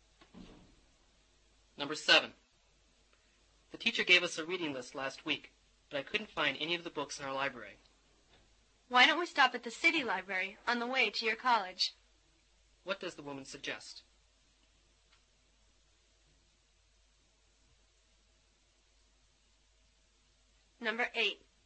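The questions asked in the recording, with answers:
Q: What does the woman suggest?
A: Stopping at the city library.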